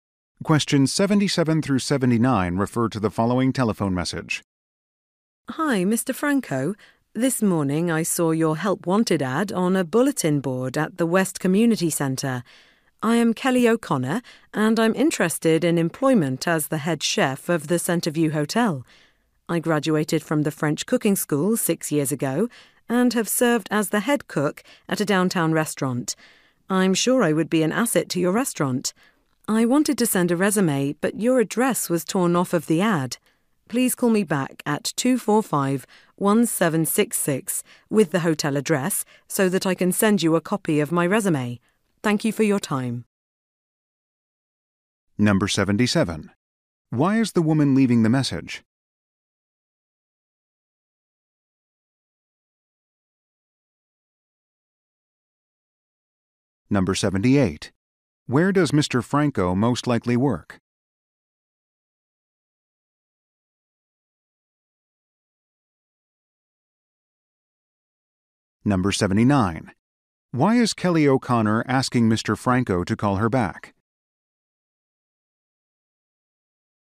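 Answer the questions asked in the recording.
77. To apply for the head chef job
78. At the Centreview Hotel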